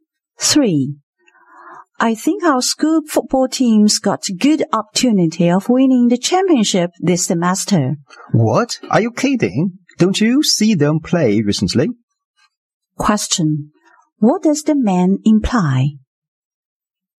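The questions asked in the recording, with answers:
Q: What does the man imply?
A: The team is unlikely to win the championship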